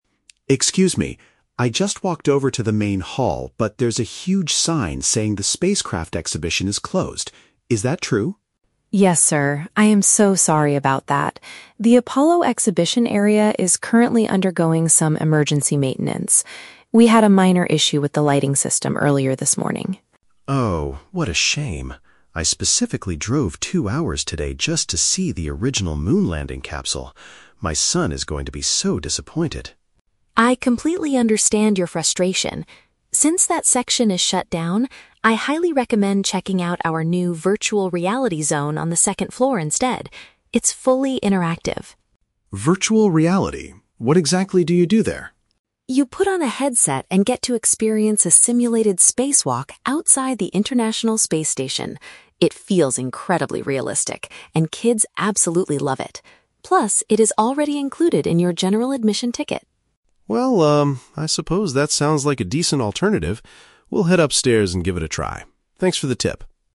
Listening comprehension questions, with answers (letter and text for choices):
Listen to the conversation between a visitor and a museum staff member. For each question, choose the correct answer (A, B, or C).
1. Why is the main spacecraft exhibition currently closed to the public?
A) They are preparing to move the moon capsule to a new location.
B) They are fixing a sudden problem with the electrical illumination.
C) They are cleaning the area after a large school group visited.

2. How does the visitor feel about the situation at first?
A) Very let down because he traveled a long way specifically to see it.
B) Extremely angry because he paid a high price for his entrance ticket.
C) Relieved because his son prefers interactive video games anyway.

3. What does the staff member suggest the visitor do instead?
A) Wait in the main hall until the emergency maintenance is fully finished.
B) Come back the following day when the Apollo exhibition finally reopens.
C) Try the simulated spacewalk experience located on a different floor.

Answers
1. B) They are fixing a sudden problem with the electrical illumination.
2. A) Very let down because he traveled a long way specifically to see it.
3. C) Try the simulated spacewalk experience located on a different floor.

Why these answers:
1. The staff mentions "emergency maintenance" because they had an "issue with the lighting system." "Lighting system" is paraphrased as "electrical illumination," and maintenance means they are "fixing" it. Option A is a trap; the "moon capsule" is mentioned by the visitor, but the museum is not moving it. Option C is a plausible reason for a museum closure, but it is never mentioned in the audio.
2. The visitor says "what a shame!" and his son will be "disappointed" (paraphrased as "let down"). He also mentions he "drove two hours today just to see" it (paraphrased as "traveled a long way"). Option B is a trap; the "ticket" is mentioned later, but the staff says the VR is included in the ticket, and the visitor is not angry about money. Option C is a trap; his son will like the VR, but initially, the father is disappointed, not relieved.
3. The staff recommends the "Virtual Reality zone on the second floor," where you can do a "simulated spacewalk." The "second floor" is paraphrased as a "different floor." Option A is a trap; the "main hall" and "maintenance" are mentioned, but she tells him to go to the second floor, not to wait. Option B is a plausible suggestion in real life, but the staff never tells him to come back tomorrow.

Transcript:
Visitor: Excuse me, I just walked over to the main hall, but there's a huge sign saying the spacecraft exhibition is closed. Is that true?
Staff: Yes, sir. I am so sorry about that. The Apollo exhibition area is currently undergoing some emergency maintenance. We had a minor issue with the lighting system earlier this morning.
Visitor: Oh, what a shame! I specifically drove two hours today just to see the original moon landing capsule. My son is going to be so disappointed.
Staff: I completely understand your frustration. Since that section is shut down, I highly recommend checking out our new Virtual Reality zone on the second floor instead. It's fully interactive.
Visitor: Virtual reality? What exactly do you do there?
Staff: You put on a headset and get to experience a simulated spacewalk outside the International Space Station. It feels incredibly realistic, and kids absolutely love it. Plus, it is already included in your general admission ticket.
Visitor: Well, um, I suppose that sounds like a decent alternative. We'll head upstairs and give it a try. Thanks for the tip.